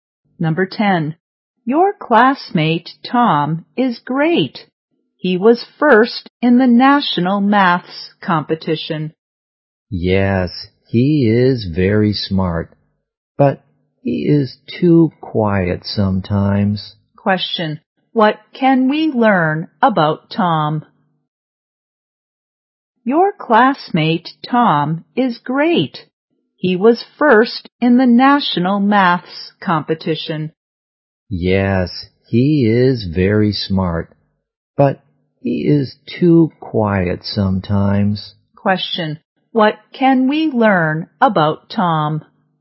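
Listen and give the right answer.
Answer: He is smart but sometimes too quiet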